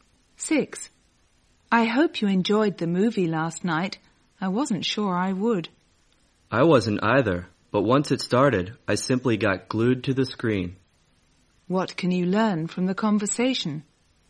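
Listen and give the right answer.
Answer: Neither expected to enjoy the movie, but they found it very absorbing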